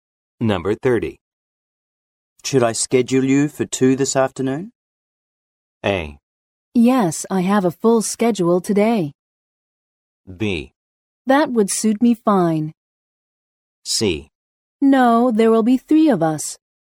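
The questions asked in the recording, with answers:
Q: Should I schedule you for 2 this afternoon?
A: B: That would suit me fine.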